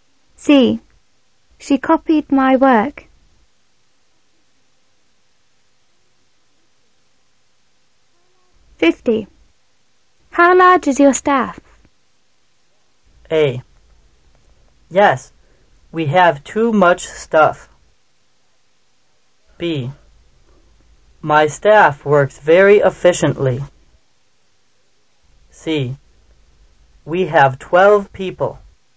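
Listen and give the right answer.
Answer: C: We have 12 people.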